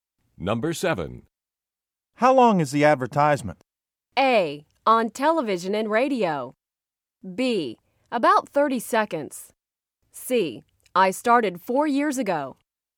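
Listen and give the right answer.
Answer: B: About 30 seconds.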